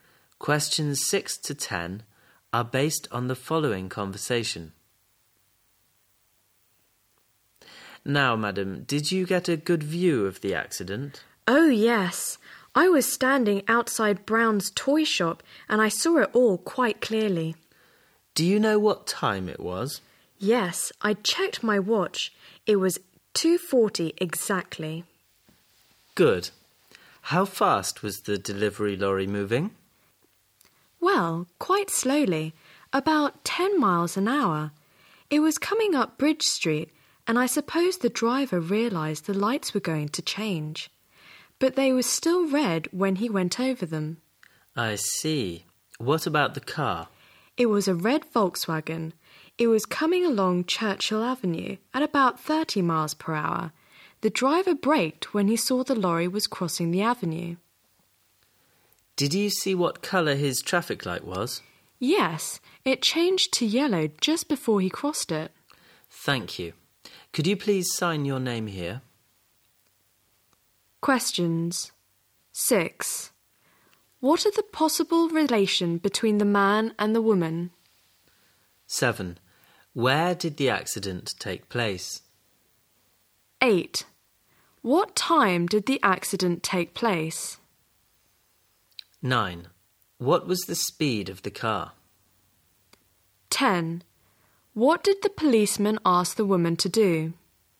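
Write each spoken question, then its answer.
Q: What are the possible relation between the man and the woman?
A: Policeman and witness

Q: Where did the accident take place?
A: Where Bridge Street crosses Churchill Avenue, near Brown's toy shop

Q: What time did the accident take place?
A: At 2:40

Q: What was the speed of the car?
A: About 30 miles an hour

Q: What did the policeman ask the woman to do?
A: Sign her name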